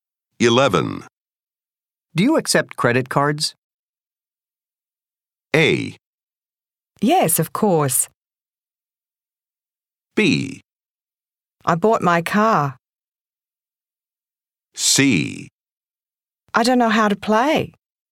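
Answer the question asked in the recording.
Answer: A: Yes, of course.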